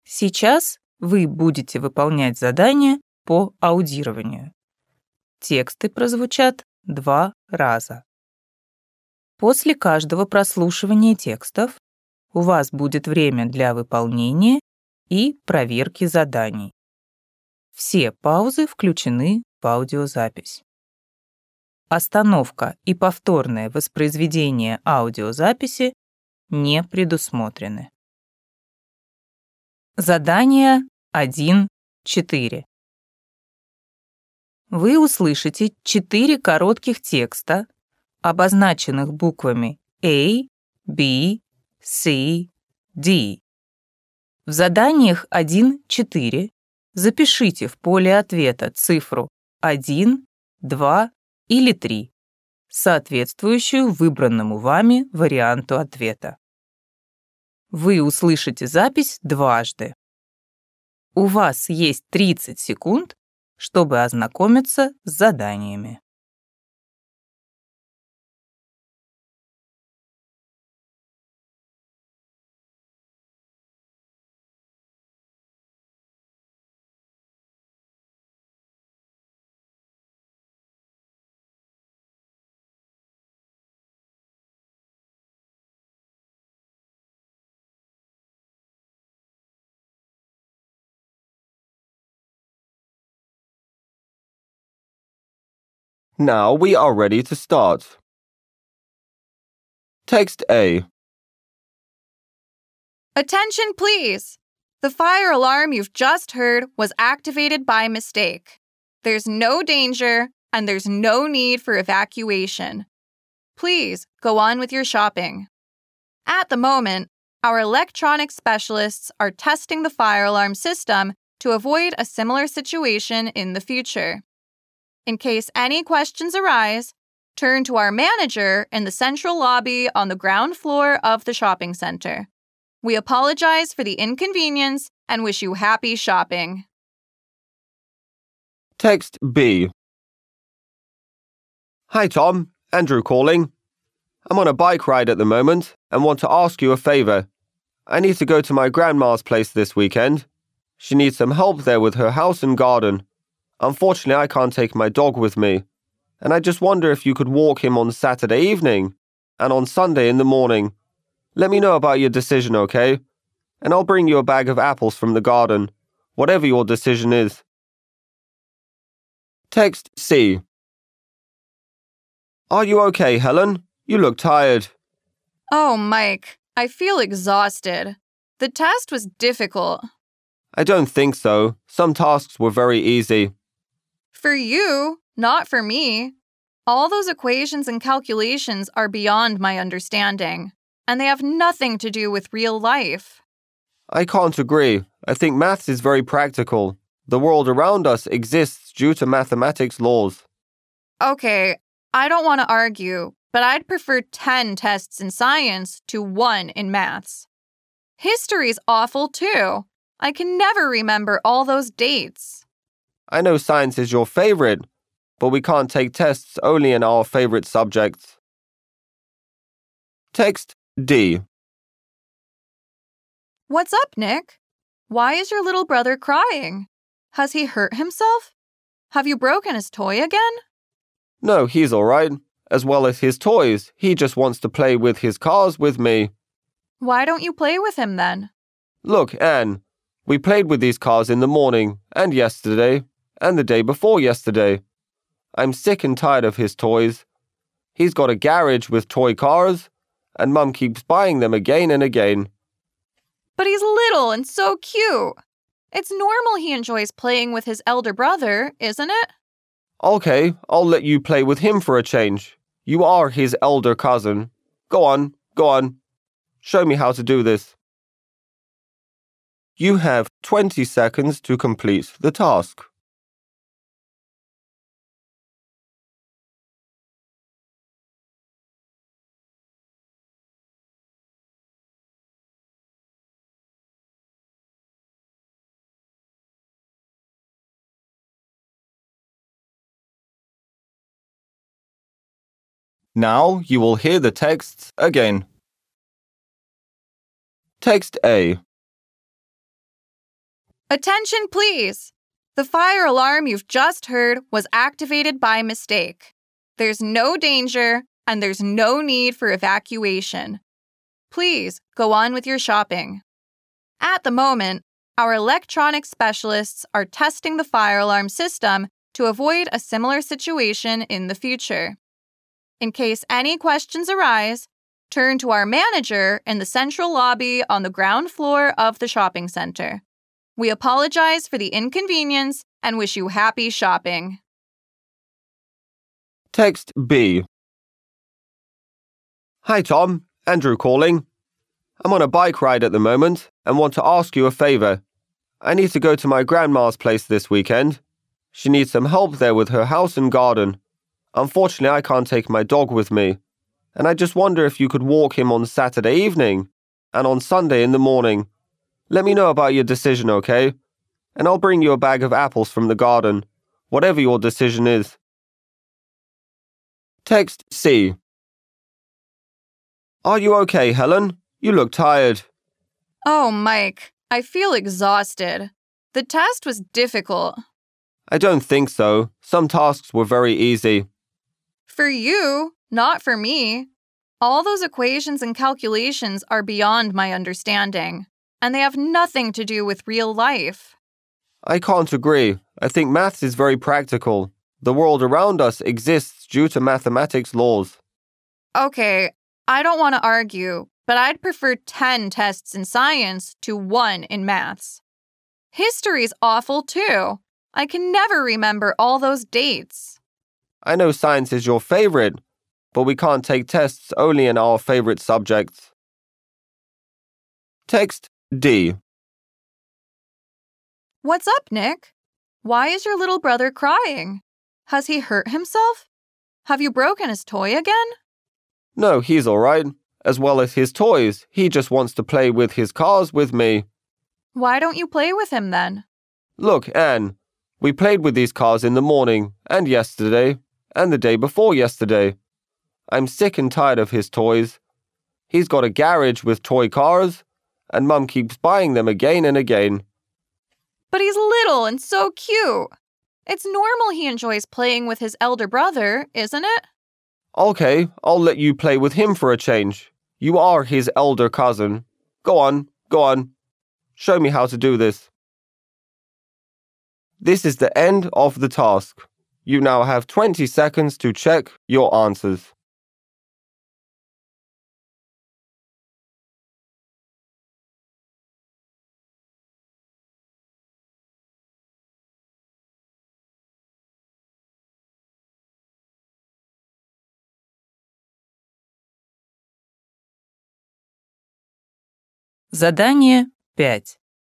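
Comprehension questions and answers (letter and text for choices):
Вы услышите четыре коротких текста, обозначенных буквами А, B, C, D.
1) According to the announcement, the visitors of the shopping centre should ...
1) leave the building immediately.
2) continue their shopping.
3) get together in the central lobby.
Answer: 2) continue their shopping.

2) Andrew asks Tom ...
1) to lend him a bicycle.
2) to take care of his pet.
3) to help him in the garden.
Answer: 2) to take care of his pet.

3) What school subject does Helen like?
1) History.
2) Maths.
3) Science.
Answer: 3) Science.

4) Nick's brother is crying because ...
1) his new toy is broken.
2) Nick refuses to play with him.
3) a cousin borrowed his toy car.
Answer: 2) Nick refuses to play with him.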